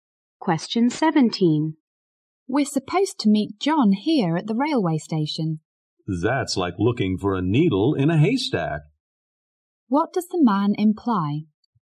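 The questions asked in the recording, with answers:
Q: What does the man imply?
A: It will be very hard to find John at the station.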